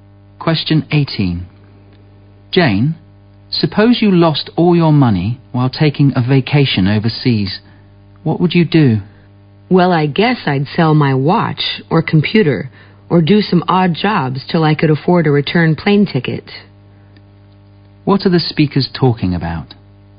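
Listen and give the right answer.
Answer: What to do if you lost all your money on a holiday abroad.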